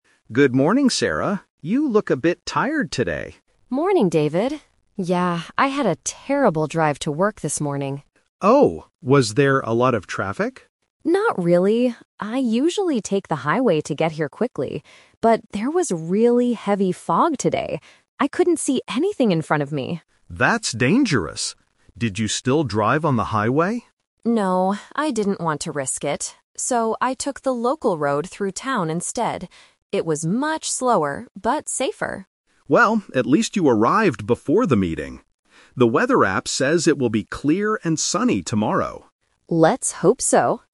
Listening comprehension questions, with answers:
Listen to the conversation and choose the correct answer (A, B, or C).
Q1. Why did Sarah have a terrible drive to work today?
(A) Because of the heavy traffic.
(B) Because of the heavy rain.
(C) Because of the heavy fog.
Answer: Because of the heavy fog.

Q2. What does Sarah usually do to get to work quickly?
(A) She takes the highway.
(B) She takes the local road.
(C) She leaves her house very early.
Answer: She takes the highway.

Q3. What did Sarah do this morning because of the weather?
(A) She missed the morning meeting.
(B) She drove on the local road.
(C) She drove carefully on the highway.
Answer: She drove on the local road.

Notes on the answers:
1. Sarah explains her bad drive by saying, "...there was really heavy fog today. I couldn't see anything...". Option (A) is the trap because David guesses there was "a lot of traffic," but Sarah replies, "Not really." Option (B) is a plausible weather condition but is never mentioned.
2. Sarah explicitly states her normal routine (Plan A): "I usually take the highway to get here quickly...". Option (B) is the trap because the local road is what she took today, not what she usually does. Option (C) is not mentioned in the audio.
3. Because of the fog, Sarah changed her plan (The Twist): "So, I took the local road through town instead." Option (C) is the trap because she usually takes the highway, but today she says, "No, I didn't want to risk it." Option (A) is a trap because David notes that she "arrived before the meeting."

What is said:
David: Good morning, Sarah. You look a bit tired today.
Sarah: Morning, David. Yeah, I had a terrible drive to work this morning.
David: Oh? Was there a lot of traffic?
Sarah: Not really. I usually take the highway to get here quickly, but there was really heavy fog today. I couldn't see anything in front of me!
David: That's dangerous. Did you still drive on the highway?
Sarah: No, I didn't want to risk it. So, I took the local road through town instead. It was much slower, but safer.
David: Well, at least you arrived before the meeting. The weather app says it will be clear and sunny tomorrow.
Sarah: Let's hope so.

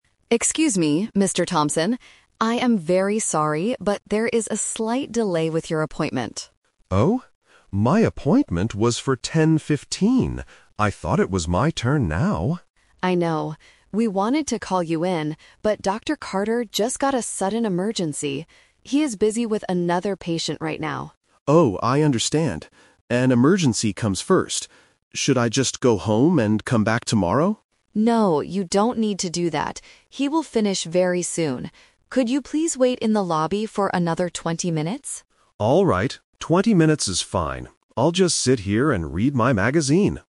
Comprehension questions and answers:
Listen to the conversation between a receptionist and a patient. Choose the correct answer (A, B, or C) for each question.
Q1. Why is there a delay at the clinic?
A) The doctor has not arrived at the clinic yet.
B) The doctor is busy treating an emergency.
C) The patient arrived too late for his appointment.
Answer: The doctor is busy treating an emergency.

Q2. What did Mr. Thompson think about doing when he heard the news?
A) Coming back to the clinic the next day.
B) Going into the doctor's room immediately.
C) Reading his magazine at home.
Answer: Coming back to the clinic the next day.

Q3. What does the receptionist ask Mr. Thompson to do?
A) Call the clinic again tomorrow morning.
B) Wait in the lobby for 20 minutes.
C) Wait in the lobby for 15 minutes.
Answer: Wait in the lobby for 20 minutes.

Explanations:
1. Trap A is wrong: The doctor is already at the clinic treating someone else, not late for work. Trap C is wrong: The patient says "I thought it was my turn now," meaning he was on time for his 10:15 appointment.
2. Mr. Thompson asks, "Should I just go home and come back tomorrow?" Trap B is wrong: He knows there is a delay, so he doesn't expect to go in immediately. Trap C is wrong: He decides to read his magazine in the clinic's lobby while waiting, not at home.
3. The receptionist asks him, "Could you please wait in the lobby for another 20 minutes?" Trap A is wrong (The Twist): Mr. Thompson offered to come back tomorrow, but the receptionist said "No, you don't need to do that." Trap C is wrong (Number Trap): 15 is a plausible number for waiting (and relates to his 10:15 appointment time), but she specifically asks him to wait for 20 minutes.

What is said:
Receptionist: Excuse me, Mr. Thompson? I am very sorry, but there is a slight delay with your appointment.
Patient: Oh? My appointment was for 10:15. I thought it was my turn now.
Receptionist: I know. We wanted to call you in, but Dr. Carter just got a sudden emergency. He is busy with another patient right now.
Patient: Oh, I understand. An emergency comes first. Should I just go home and come back tomorrow?
Receptionist: No, you don't need to do that. He will finish very soon. Could you please wait in the lobby for another 20 minutes?

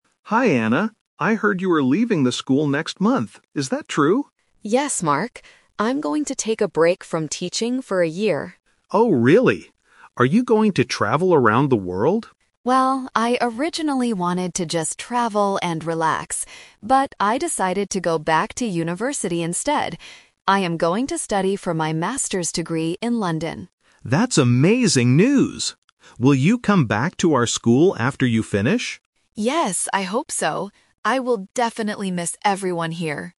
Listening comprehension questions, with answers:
Listen to a conversation between two teachers, Mark and Anna. For each question, choose the correct answer (A, B, or C).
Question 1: What is Anna going to do next month?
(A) Start a new job in London.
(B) Stop teaching for a year.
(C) Teach at a different school.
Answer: Stop teaching for a year.

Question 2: Why is Anna going to London?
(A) To travel and relax.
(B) To visit her family.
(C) To study for a Master's degree.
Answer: To study for a Master's degree.

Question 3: What does Anna plan to do after she finishes her studies?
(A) Return to her current school.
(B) Travel around the world.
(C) Look for a job in London.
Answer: Return to her current school.

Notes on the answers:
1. Anna says, "I'm going to take a break from teaching for a year." This means she will stop teaching (Option B - Key). Option A is a trap because she is going to London to study, not to work. Option C is not mentioned.
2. Mark asks if she is going to travel around the world. Anna says she "originally wanted to just travel and relax" (Option A - Trap). However, she changes her plan ("But...") and says she will "study for my Master's degree in London" (Option C - Key). Option B is a plausible reason to go to London but is not mentioned.
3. Mark asks, "Will you come back to our school after you finish?" and Anna replies, "Yes, I hope so." This means she plans to return (Option A - Key). Option B is a trap because "travel around the world" was her old plan. Option C is not mentioned.

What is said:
Mark: Hi Anna. I heard you are leaving the school next month. Is that true?
Anna: Yes, Mark. I'm going to take a break from teaching for a year.
Mark: Oh, really? Are you going to travel around the world?
Anna: Well, I originally wanted to just travel and relax. But, I decided to go back to university instead. I am going to study for my Master's degree in London.
Mark: That's amazing news! Will you come back to our school after you finish?

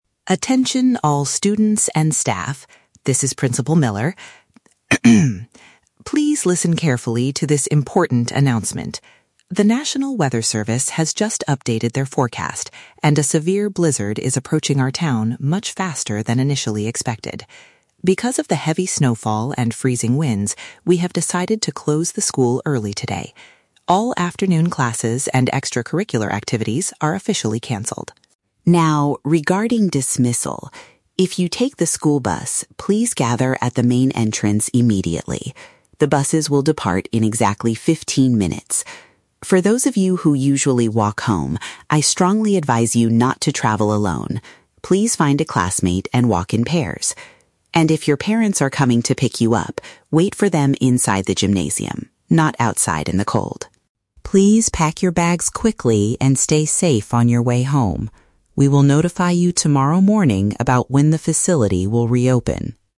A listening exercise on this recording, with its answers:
Listen to a school announcement and choose the correct answer (A, B, or C) for each question.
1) Why is the school closing earlier than usual today?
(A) Because the heating system in the classrooms is broken.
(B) Because the snowstorm is arriving sooner than predicted.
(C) Because all the afternoon sports activities have finished.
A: Because the snowstorm is arriving sooner than predicted.

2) What instruction is given to students who go home on foot?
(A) They should head directly to the main doors.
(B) They should wait for their families in the sports hall.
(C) They should travel together with another person.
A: They should travel together with another person.

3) Where should students stay if their parents are coming to get them?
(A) Indoors at the sports facility.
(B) Outdoors near the school gate.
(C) Inside their regular classrooms.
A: Indoors at the sports facility.

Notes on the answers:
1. The principal says a severe blizzard is approaching "much faster than initially expected." "Snowstorm" is a synonym for blizzard, and "sooner than predicted" is a paraphrase of faster than expected. Why traps are wrong: Option (A) is a plausible reason for a school to close in winter, but it is not mentioned at all. Option (C) uses words from the audio ("afternoon", "activities"), but the audio says these activities are canceled, not finished.
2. For students who walk home, the principal advises them "not to travel alone" and to "walk in pairs". "Travel together with another person" is a paraphrase of walking in pairs. Why traps are wrong: Option (A) is the trap for a different group; the "main entrance" is where the bus riders need to go. Option (B) is also a trap; waiting in the gym is for students whose parents are picking them up.
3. The principal tells students being picked up by parents to wait "inside the gymnasium". "Indoors at the sports facility" is a direct paraphrase of inside the gymnasium. Why traps are wrong: Option (B) is explicitly rejected by the speaker; she says "not outside in the cold". Option (C) is a plausible place to wait, but it is not what the principal instructed.

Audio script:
Principal Miller: Attention all students and staff. This is Principal Miller. Please listen carefully to this important announcement. The national weather service has just updated their forecast, and a severe blizzard is approaching our town much faster than initially expected. Because of the heavy snowfall and freezing winds, we have decided to close the school early today. All afternoon classes and extracurricular activities are officially canceled.
Now, regarding dismissal. If you take the school bus, please gather at the main entrance immediately. The buses will depart in exactly fifteen minutes. For those of you who usually walk home, I strongly advise you not to travel alone; please find a classmate and walk in pairs. And if your parents are coming to pick you up, wait for them inside the gymnasium, not outside in the cold.
Please pack your bags quickly and stay safe on your way home. We will notify you tomorrow morning about when the facility will reopen.

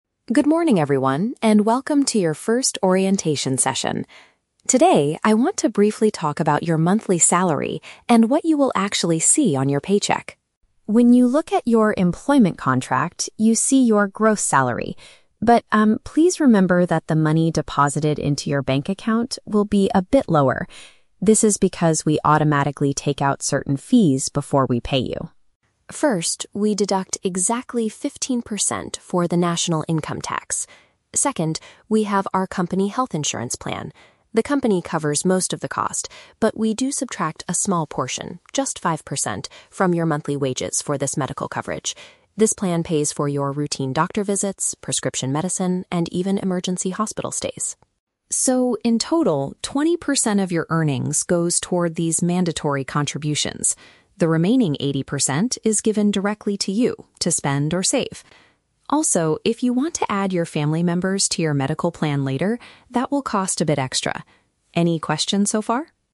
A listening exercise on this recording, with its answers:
Listen to an HR representative giving a presentation to new employees, then choose the correct answer (A, B, or C) for each question.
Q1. What portion of the workers' income goes toward national taxes?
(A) Exactly five percent.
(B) Exactly fifteen percent.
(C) Exactly twenty percent.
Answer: Exactly fifteen percent.

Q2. What is the main purpose of the five percent deduction?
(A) To pay for medical care and hospital treatments.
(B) To provide healthcare for the employees' relatives.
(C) To save money for the company's emergency fund.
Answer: To pay for medical care and hospital treatments.

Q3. What happens to the remaining eighty percent of the employee's earnings?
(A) It is kept by the employer for future benefits.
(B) It is sent to a separate retirement account.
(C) It is given to the staff member to use freely.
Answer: It is given to the staff member to use freely.

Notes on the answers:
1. The representative clearly states, "we deduct exactly fifteen percent for the national income tax."
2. The speaker says the five percent is subtracted for "medical coverage" which pays for "doctor visits, prescription medicine, and even emergency hospital stays."
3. The HR representative says, "The remaining eighty percent is given directly to you to spend or save."

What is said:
HR Representative: Good morning, everyone, and welcome to your first orientation session. Today, I want to briefly talk about your monthly salary and what you will actually see on your paycheck.
When you look at your employment contract, you see your gross salary. But, um, please remember that the money deposited into your bank account will be a bit lower. This is because we automatically take out certain fees before we pay you.
First, we deduct exactly fifteen percent for the national income tax. Second, we have our company health insurance plan. The company covers most of the cost, but we do subtract a small portion—just five percent—from your monthly wages for this medical coverage. This plan pays for your routine doctor visits, prescription medicine, and even emergency hospital stays.
So, in total, twenty percent of your earnings goes toward these mandatory contributions. The remaining eighty percent is given directly to you to spend or save. Also, if you want to add your family members to your medical plan later, that will cost a bit extra. Any questions so far?

